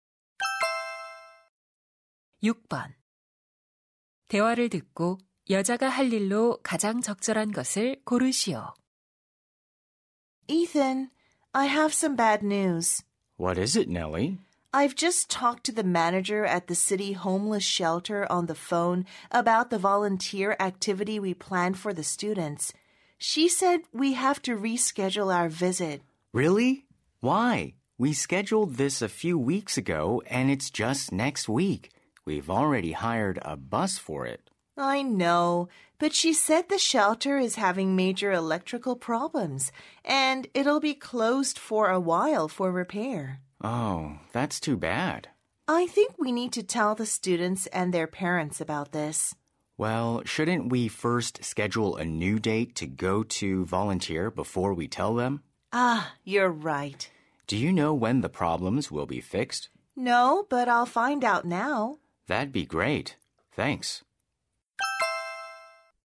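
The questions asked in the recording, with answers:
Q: 대화를 듣고 여자가 할 일로 가장 적절한 것을 고르시오.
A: 보호소 수리가 언제 끝나는지 알아보기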